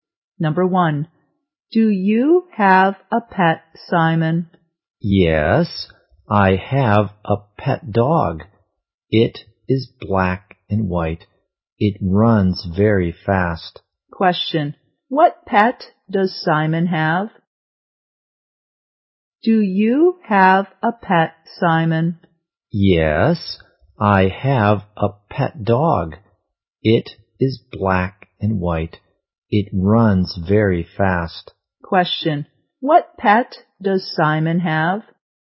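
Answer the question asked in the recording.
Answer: A black and white dog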